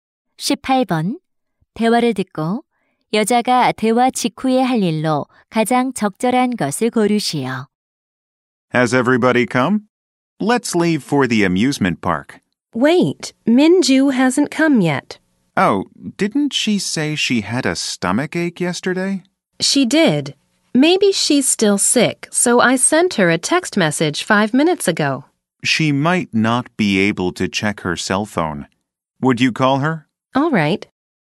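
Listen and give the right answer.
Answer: 민주에게 전화하기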